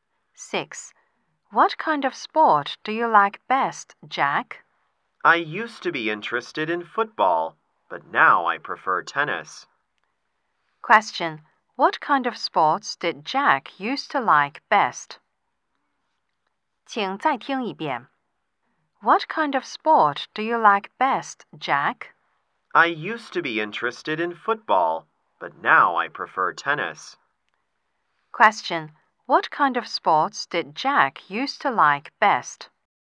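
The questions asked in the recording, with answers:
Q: What kind of sports did Jack used to like best?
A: Football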